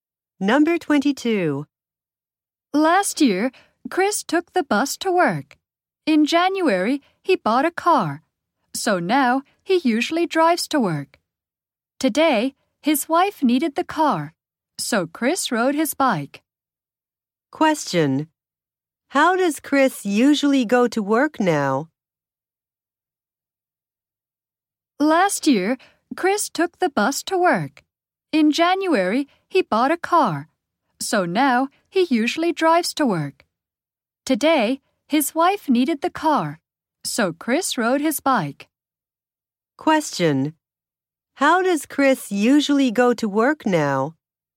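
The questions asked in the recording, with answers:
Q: How does Chris usually go to work now?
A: He drives.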